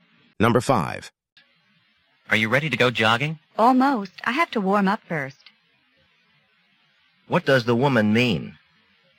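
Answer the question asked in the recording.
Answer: She's almost ready but needs to warm up first.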